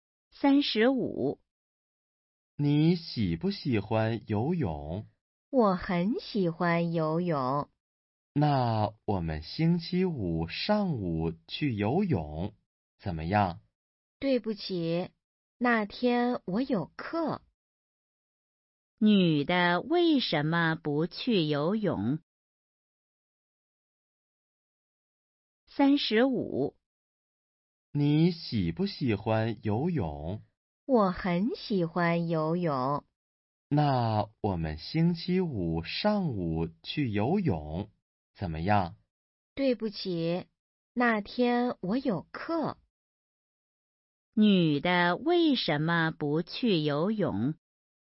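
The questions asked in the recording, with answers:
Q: 女的为什么不去游泳?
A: 那天有课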